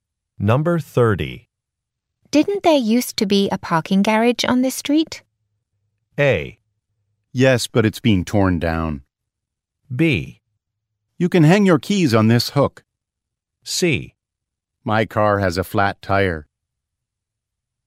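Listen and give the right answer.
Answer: A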